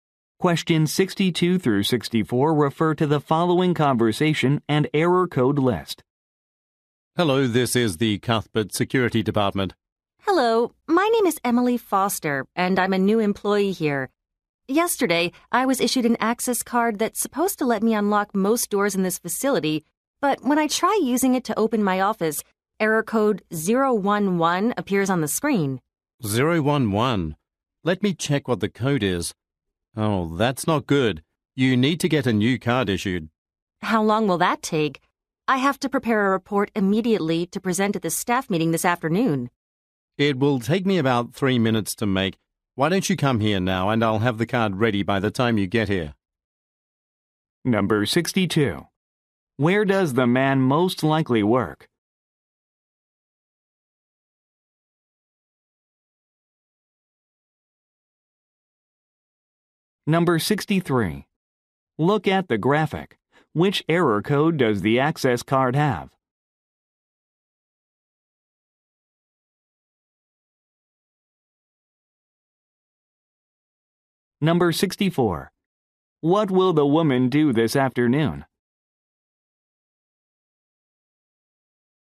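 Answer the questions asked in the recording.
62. In the security department.
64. Present a report at a staff meeting.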